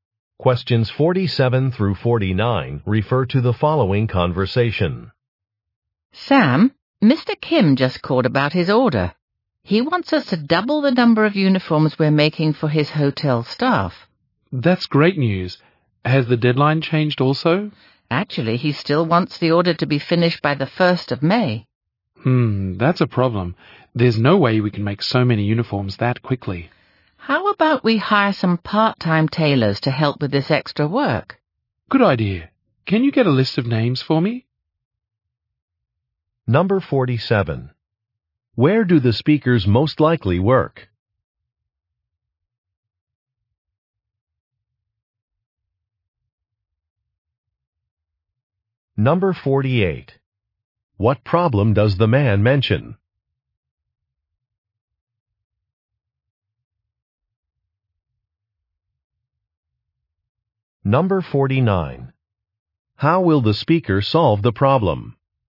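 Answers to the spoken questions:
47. At a uniform-making (tailoring) company
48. They can't make so many uniforms by the deadline
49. Hire part-time tailors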